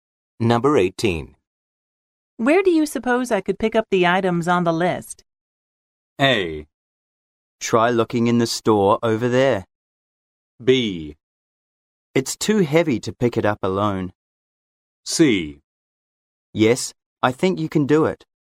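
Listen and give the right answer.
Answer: A: Try looking in the store over there.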